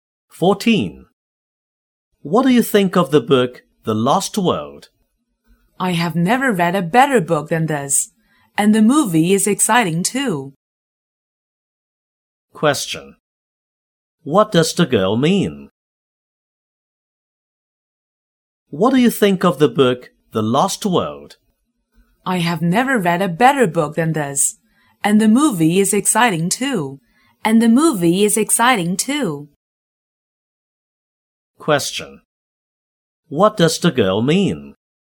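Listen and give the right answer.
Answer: The book is the best she has ever read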